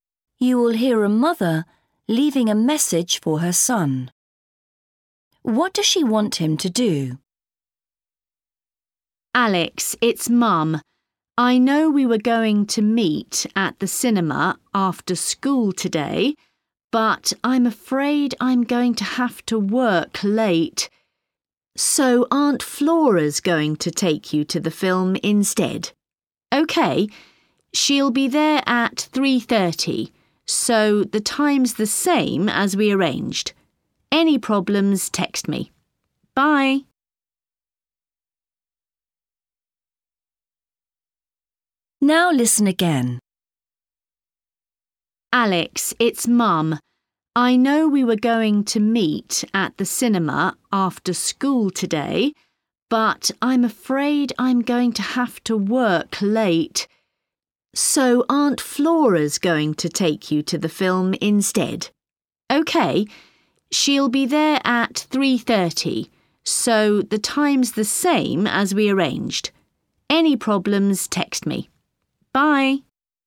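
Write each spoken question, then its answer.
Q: What does she want him to do?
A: Go to the film with Aunt Flora at the same time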